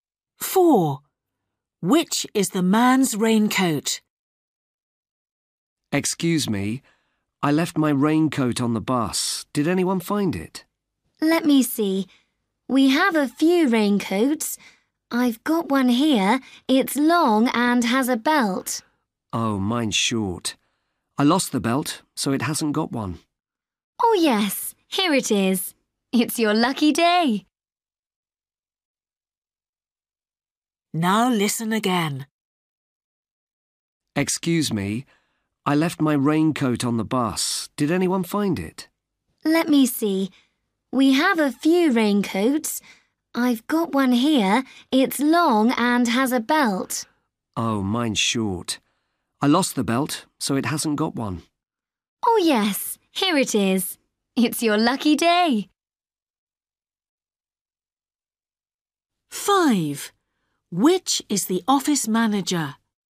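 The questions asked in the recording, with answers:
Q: Which is the man's raincoat?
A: The short one without a belt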